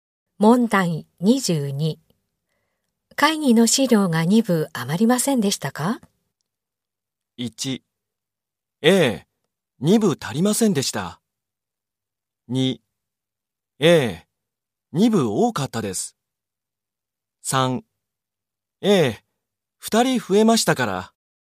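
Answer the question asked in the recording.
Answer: 2: ええ、2部多かったです。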